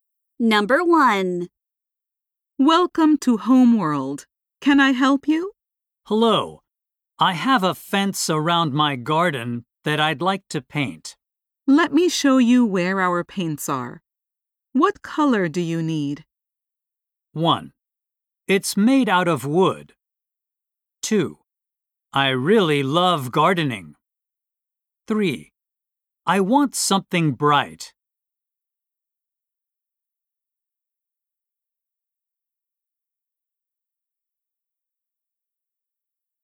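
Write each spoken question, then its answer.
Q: What color do you need?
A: 3: I want something bright.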